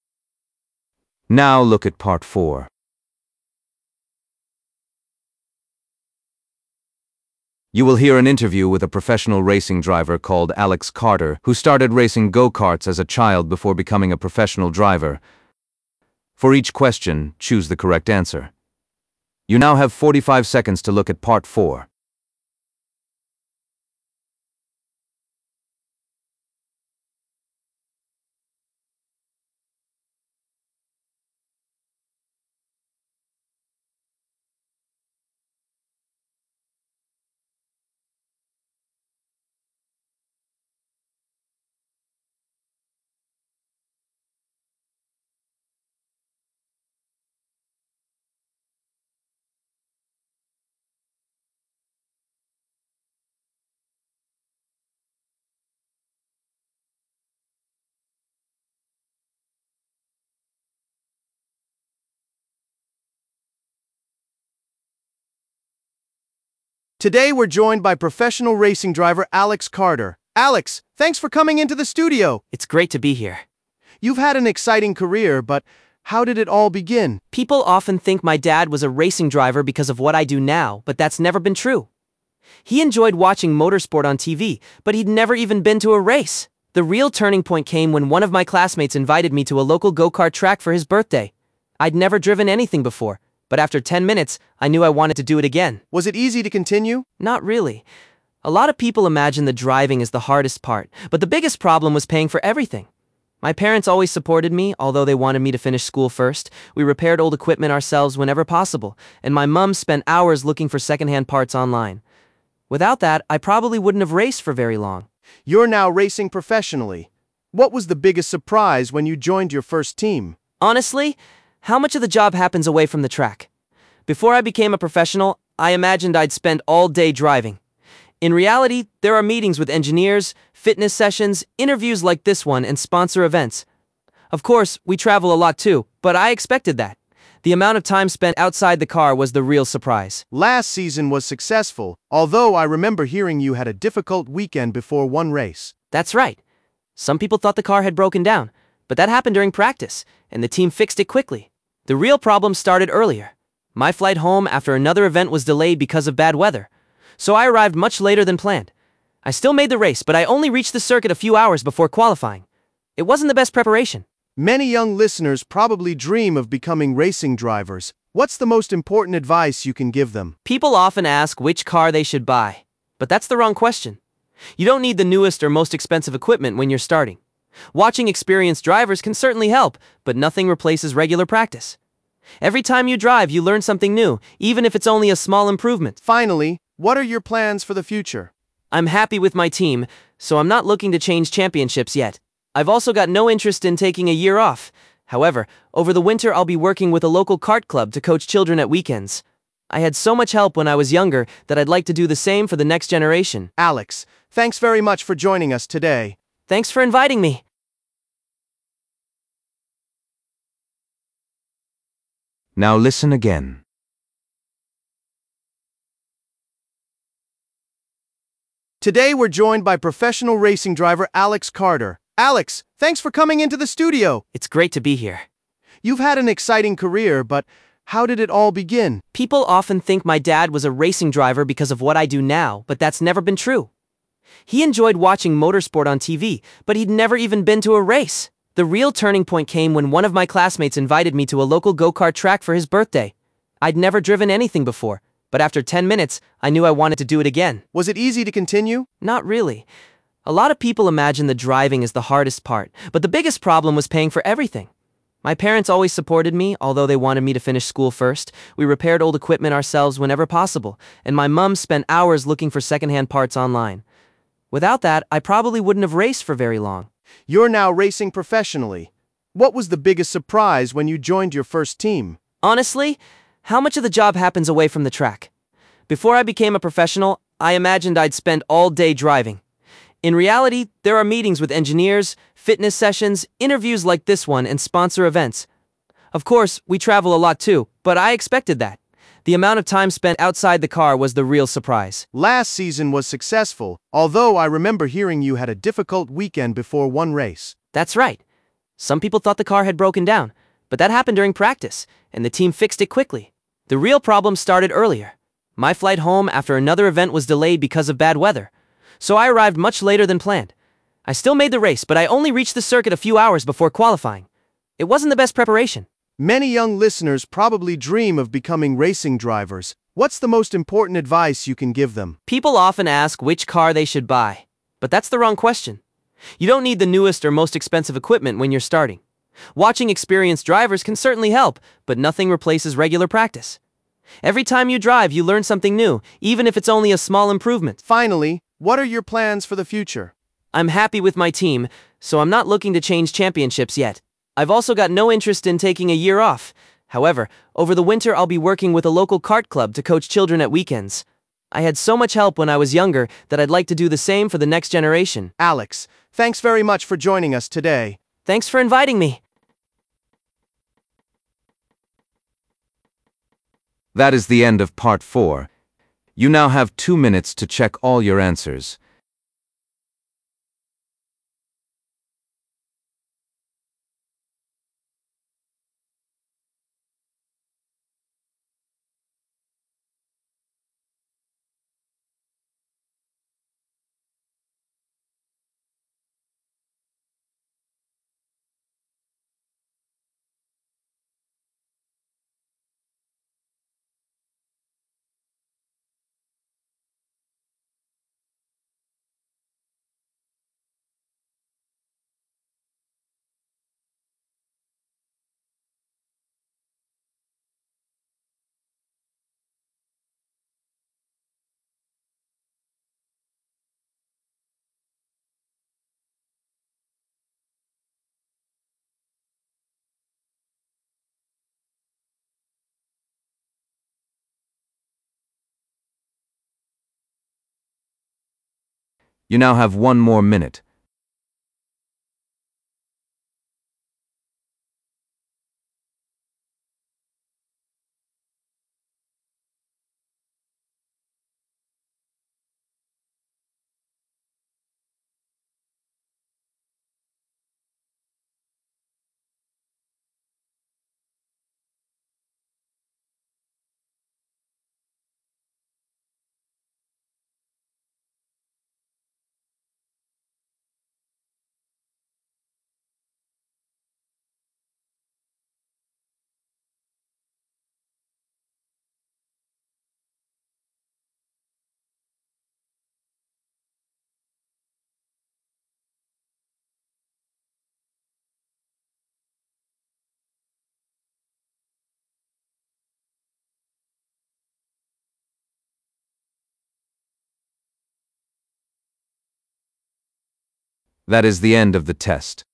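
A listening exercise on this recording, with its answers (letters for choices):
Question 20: How did Alex first become interested in motor racing?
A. His father took him to watch a race.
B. A friend invited him to try go-karting.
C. He received a go-kart as a birthday present.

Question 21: What does Alex say was the biggest challenge when he wanted to race more seriously?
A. Finding enough money.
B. Improving his fitness.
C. Convincing his parents.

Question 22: What surprised Alex most when he became a professional driver?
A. How much travelling he had to do.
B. How difficult the races were.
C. How little time he actually spent driving.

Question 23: Why did Alex nearly miss an important race last season?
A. He became ill the day before.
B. His flight was delayed.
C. His race car developed a mechanical problem.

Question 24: What advice does Alex give to young people who want to become racing drivers?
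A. Buy the fastest equipment you can afford.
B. Watch experienced drivers carefully.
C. Spend as much time practising as possible.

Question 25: What is Alex planning to do next year?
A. Help young drivers improve their skills.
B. Race in a different championship.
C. Take a break from racing.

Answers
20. B
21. A
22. C
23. B
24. C
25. A

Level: B1 Preliminary (PET)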